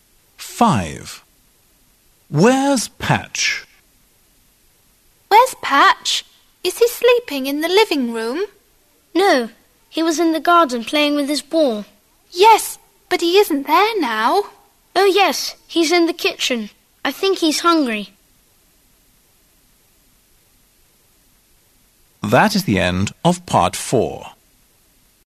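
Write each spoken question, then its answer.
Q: Where's Patch?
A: in the kitchen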